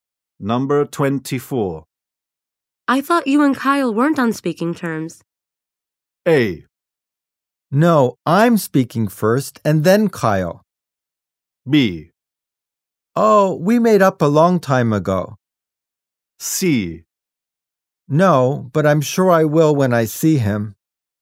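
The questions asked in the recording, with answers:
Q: I thought you and Kyle weren't on speaking terms.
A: B: Oh, we made up a long time ago.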